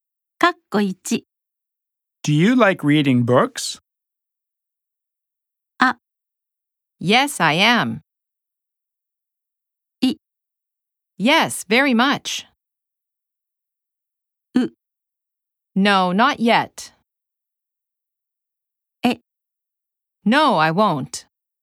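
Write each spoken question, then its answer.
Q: Do you like reading books?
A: い: Yes, very much.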